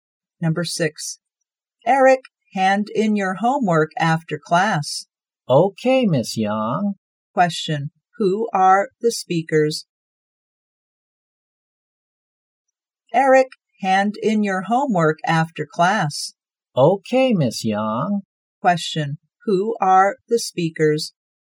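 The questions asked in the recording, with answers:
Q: who are the speakers?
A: A teacher and a student.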